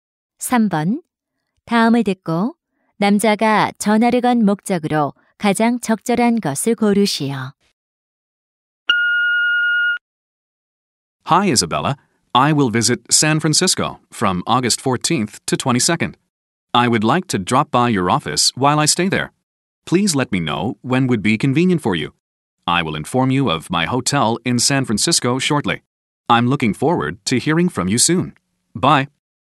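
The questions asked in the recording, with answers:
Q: 다음을 듣고 남자가 전화를 건 목적으로 가장 적절한 것을 고르시오.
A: 샌프란시스코 방문 중 사무실을 방문할 편한 시간을 묻기 위해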